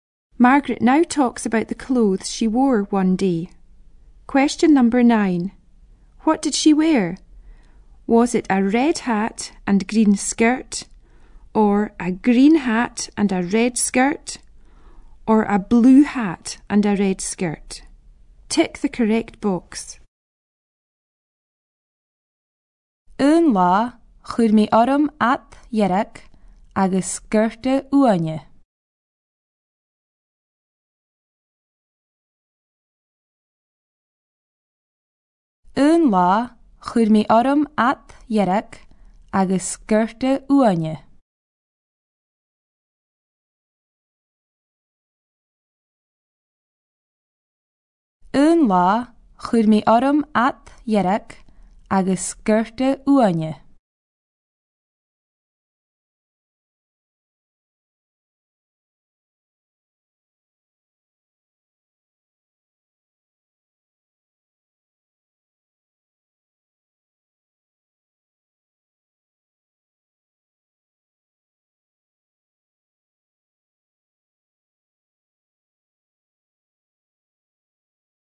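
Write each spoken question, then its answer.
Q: What did she wear?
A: A red hat and green skirt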